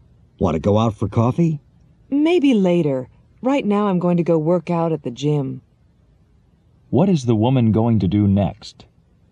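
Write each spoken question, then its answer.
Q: What is the woman going to do next?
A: Work out at the gym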